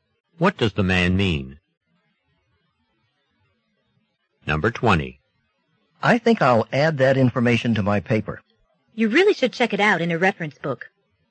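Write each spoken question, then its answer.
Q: What does the woman imply?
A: The man should check the information first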